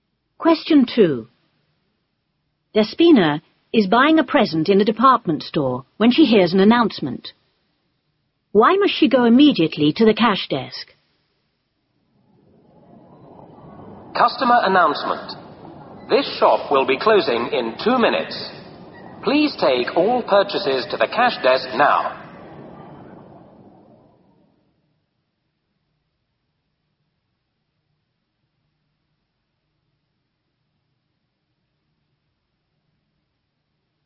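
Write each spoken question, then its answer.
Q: Why must she go immediately to the cash desk?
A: The shop will be closing in 2 minutes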